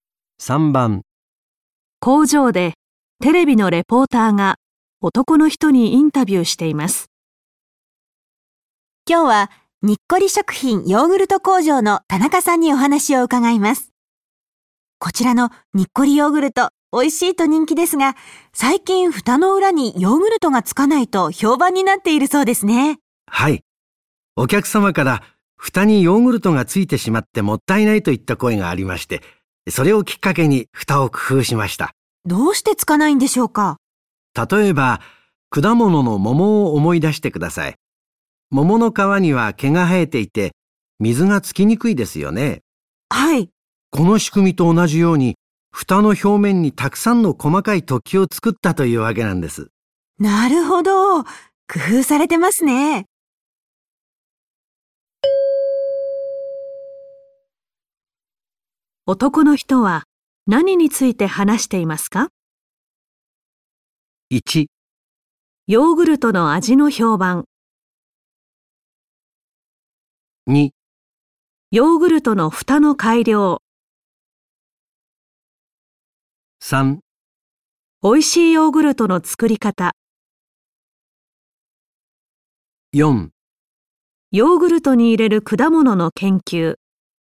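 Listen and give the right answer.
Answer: 2: ヨーグルトの蓋の改良。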